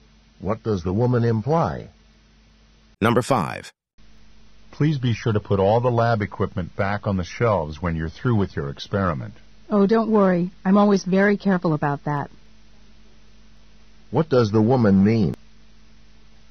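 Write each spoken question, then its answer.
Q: What does the woman mean?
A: She always puts the lab equipment back.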